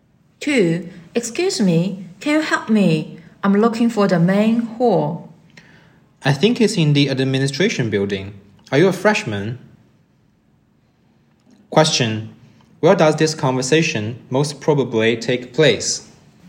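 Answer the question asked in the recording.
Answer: On a university campus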